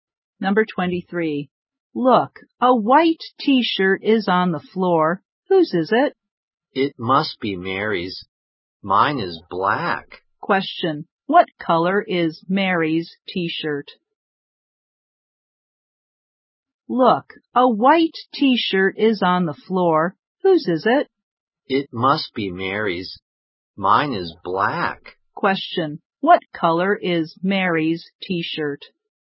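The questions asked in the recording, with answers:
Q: What color is Mary's t-shirt?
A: White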